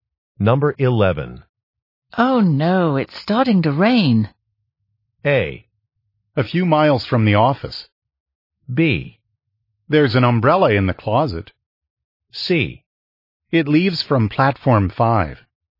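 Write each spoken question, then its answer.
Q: Oh no, it's starting to rain.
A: B: There's an umbrella in the closet.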